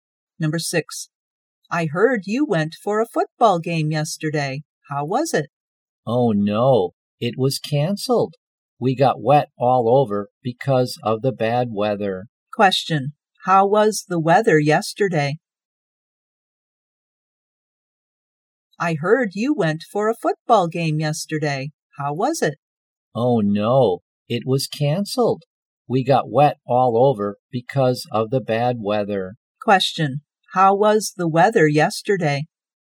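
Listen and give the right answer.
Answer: Rainy.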